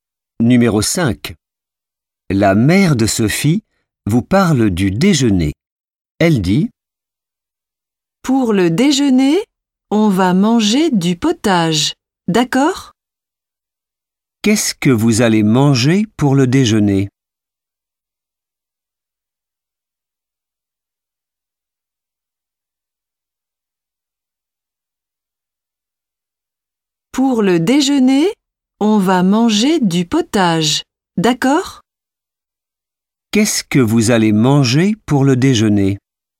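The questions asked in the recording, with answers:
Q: Qu'est-ce que vous allez manger pour le déjeuner?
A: du potage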